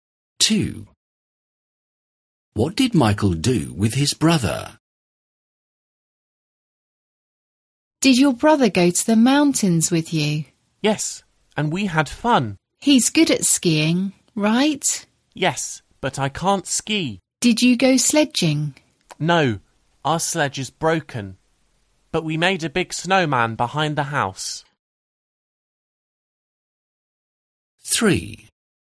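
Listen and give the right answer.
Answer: made a big snowman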